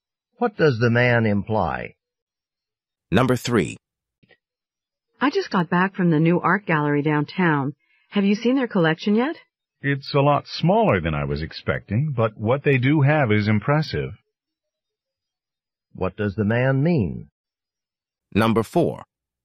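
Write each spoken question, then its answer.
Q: What does the man mean?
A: The gallery's collection is small but impressive.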